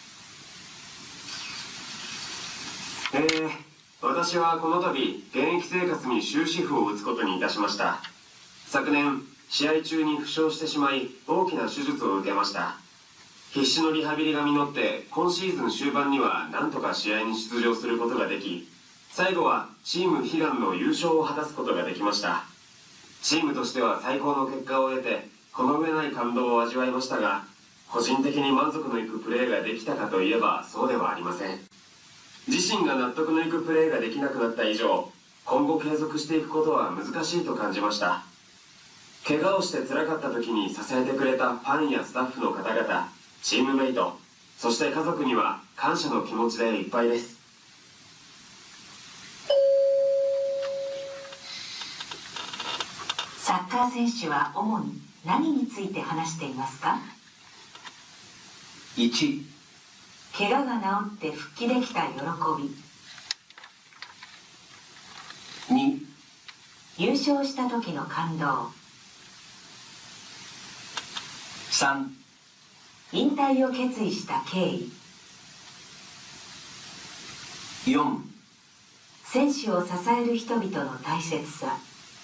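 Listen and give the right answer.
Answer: 3: 引退を決意した経緯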